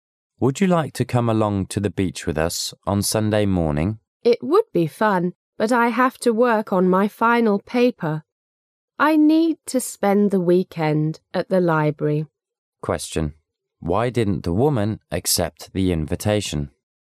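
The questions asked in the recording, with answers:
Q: Why didn't the woman accept the invitation?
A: She has to work on her final paper at the library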